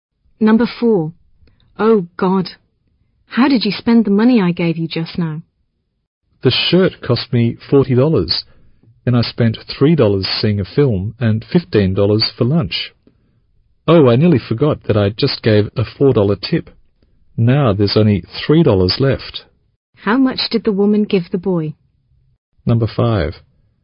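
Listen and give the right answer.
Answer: $65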